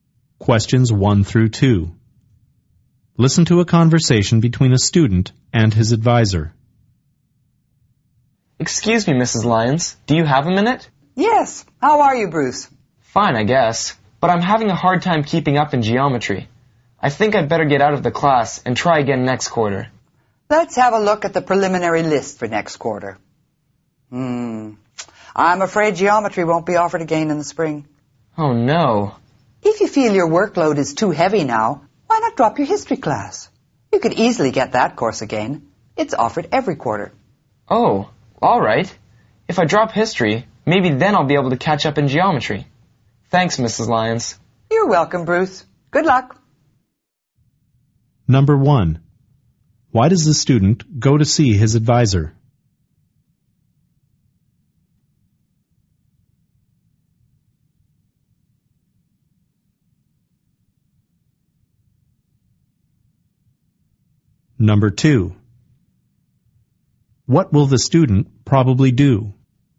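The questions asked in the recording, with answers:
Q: Why does the student go to see his advisor?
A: He is having a hard time in geometry and wants to drop the class

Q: What will the student probably do?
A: Drop his history class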